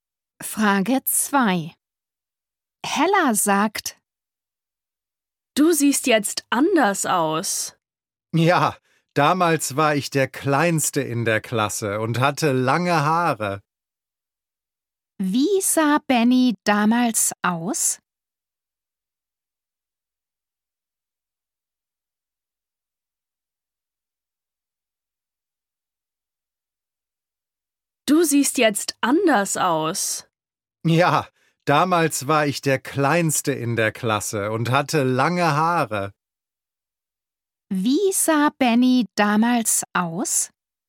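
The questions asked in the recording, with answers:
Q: Wie sah Benny damals aus?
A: Er war der Kleinste in der Klasse und hatte lange Haare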